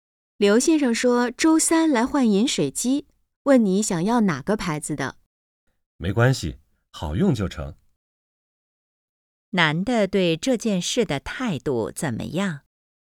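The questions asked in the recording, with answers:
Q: 男的对这件事的态度怎么样?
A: 无所谓牌子,好用就行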